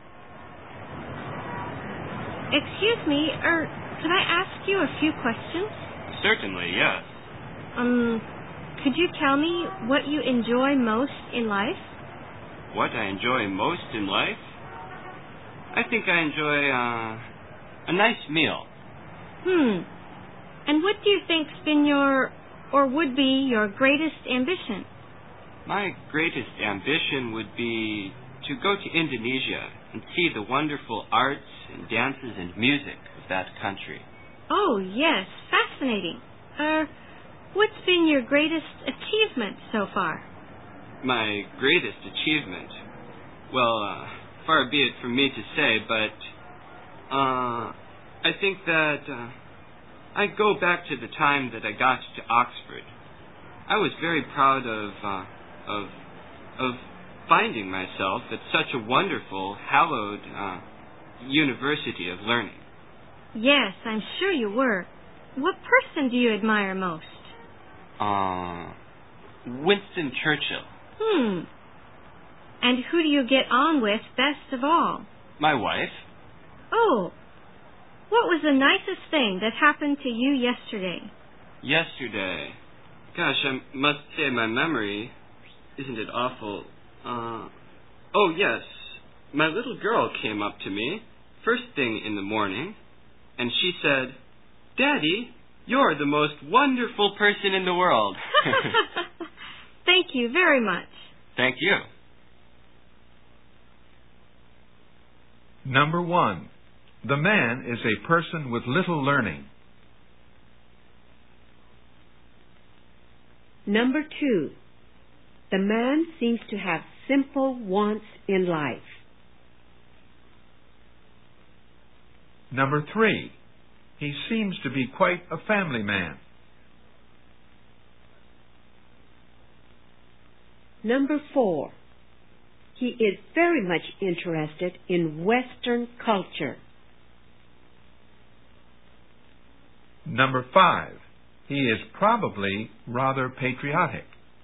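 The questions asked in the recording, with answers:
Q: the man is a person with little learning.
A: False

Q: the man seems to have simple wants in life.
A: True

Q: he seems to be quite a family man.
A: True

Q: he is very much interested in Western culture.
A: False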